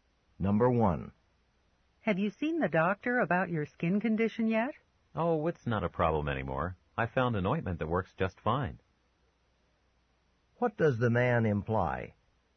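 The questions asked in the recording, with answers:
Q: What does the man imply?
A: His skin problem is gone because an ointment worked, so he doesn't need the doctor.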